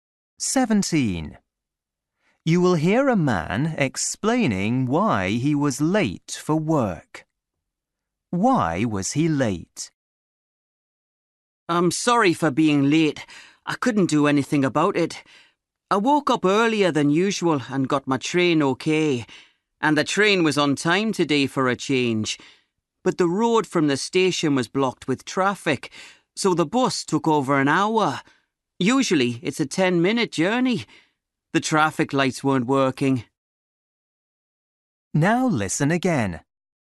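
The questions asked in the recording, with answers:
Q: Why was he late?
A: heavy traffic delayed his bus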